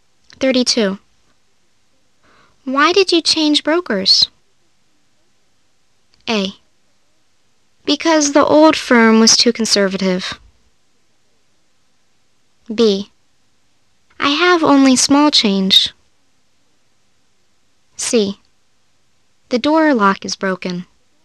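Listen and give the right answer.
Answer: A: Because the old firm was too conservative.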